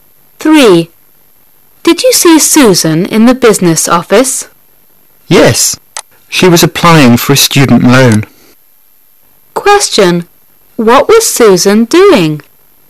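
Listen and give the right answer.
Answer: Applying for a student loan.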